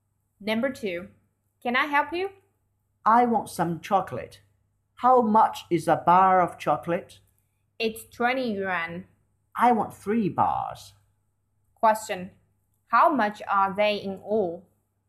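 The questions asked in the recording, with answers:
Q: How much are they in all?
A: 60 yuan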